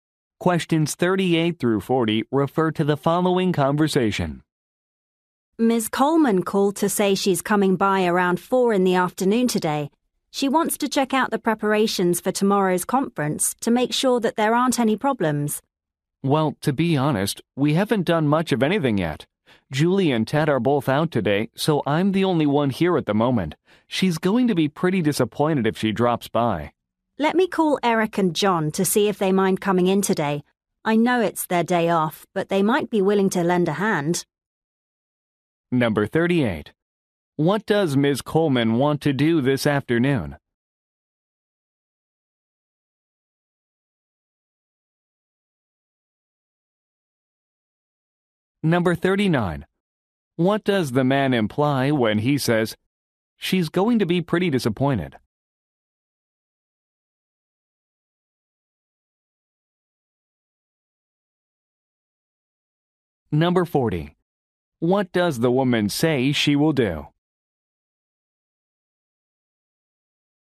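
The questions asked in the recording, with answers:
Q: What does Ms. Coleman want to do this afternoon?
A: Check the preparations for tomorrow's conference

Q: What does the man imply when he says, "She's going to be pretty disappointed"?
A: Not enough preparation has been done

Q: What does the woman say she will do?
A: Call Eric and John to ask them to come in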